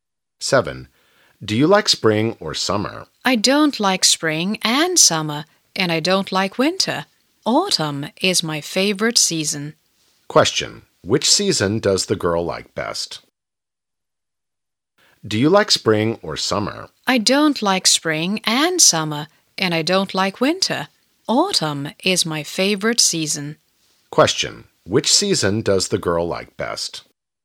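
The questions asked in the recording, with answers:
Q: Question: which season does the girl like best?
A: Autumn.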